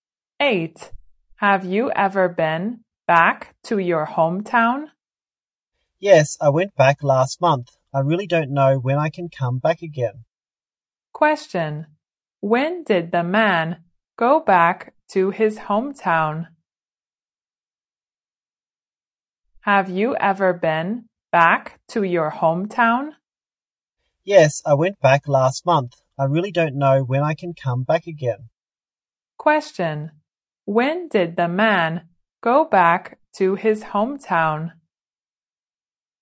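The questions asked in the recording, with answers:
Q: When did the man go back to his hometown?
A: Last month.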